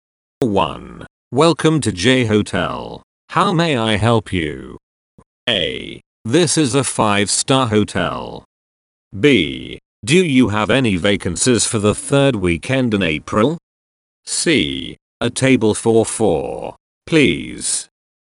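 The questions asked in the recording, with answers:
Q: Welcome to J Hotel. How may I help you?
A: B: Do you have any vacancies for the third weekend in April?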